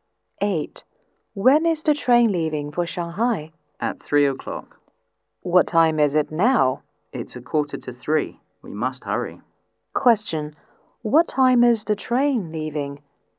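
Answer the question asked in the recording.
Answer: At 3 o'clock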